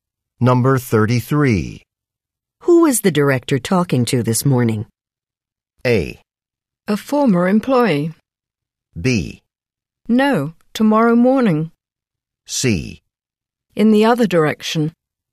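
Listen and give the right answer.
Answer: A: A former employee.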